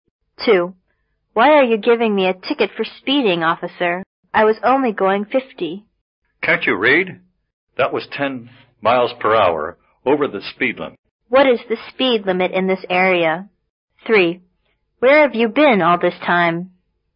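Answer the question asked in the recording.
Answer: 40 miles per hour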